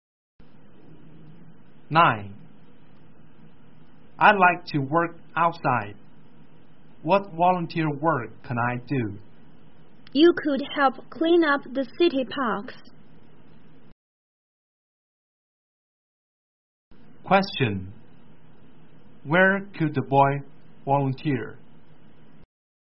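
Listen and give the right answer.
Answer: In the city parks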